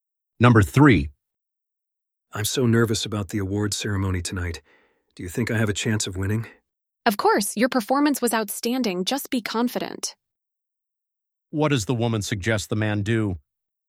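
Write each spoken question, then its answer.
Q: What does the woman suggest the man do?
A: Be confident.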